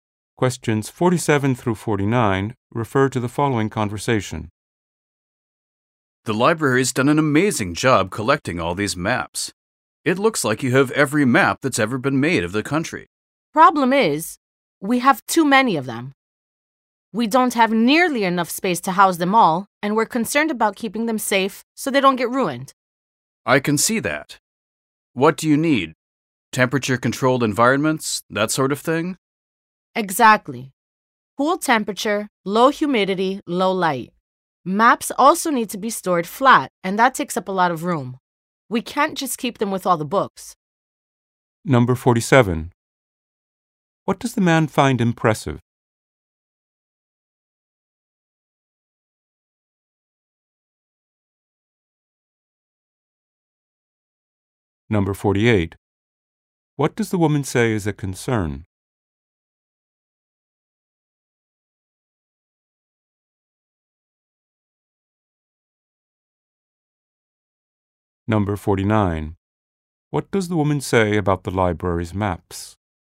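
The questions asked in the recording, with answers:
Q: What does the man find impressive?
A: The library's map collection

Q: What does the woman say is a concern?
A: Not enough space and keeping the maps safe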